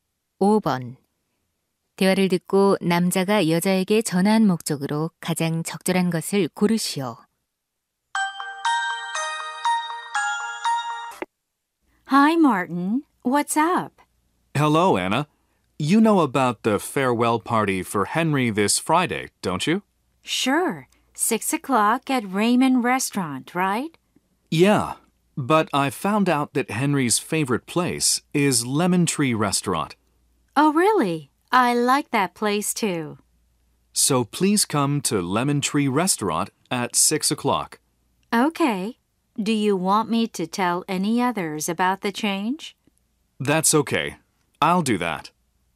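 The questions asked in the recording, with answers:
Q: 대화를 듣고 남자가 여자에게 전화한 목적으로 가장 적절한 것을 고르시오.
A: 송별회 장소 변경을 알리려고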